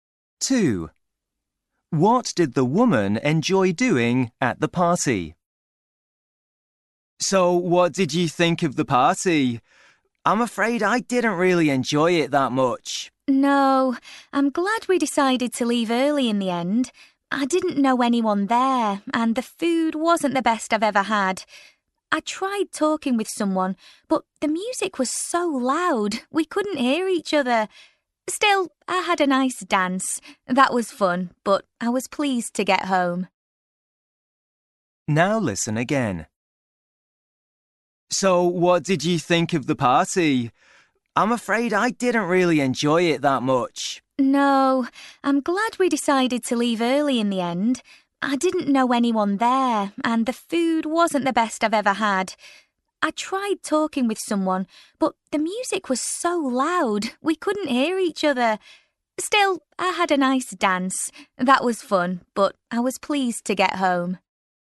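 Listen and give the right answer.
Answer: Dancing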